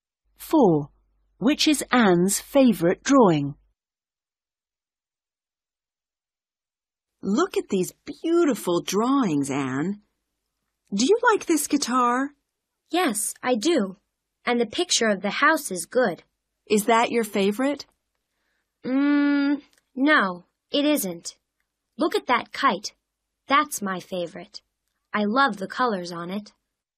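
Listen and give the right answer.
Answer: The kite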